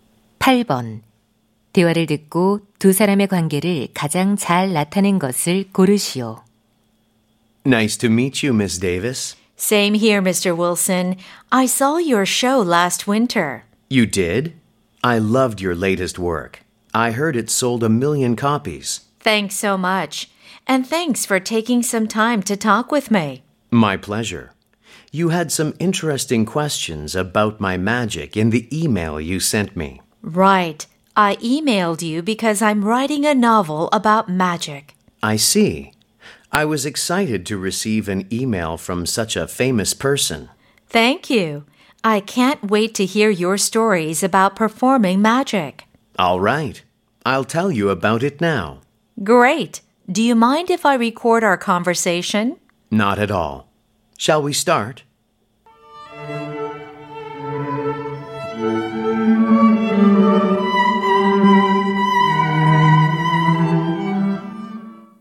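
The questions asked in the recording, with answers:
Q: 대화를 듣고 두 사람의 관계를 가장 잘 나타낸 것을 고르시오.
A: 소설가 - 마술사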